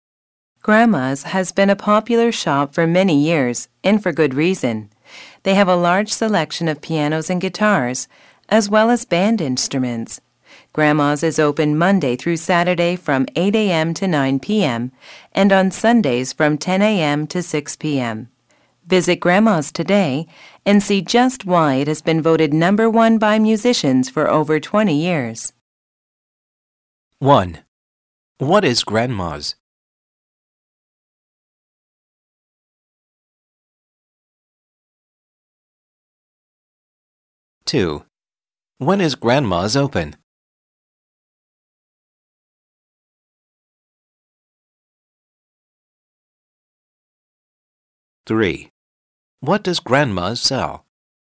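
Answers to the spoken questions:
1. A musical instrument shop
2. Monday to Saturday 8 a.m. to 9 p.m., Sundays 10 a.m. to 6 p.m.
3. Pianos, guitars and band instruments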